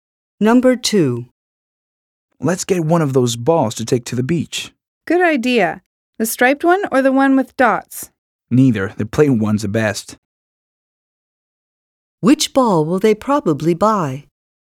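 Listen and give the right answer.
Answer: The plain one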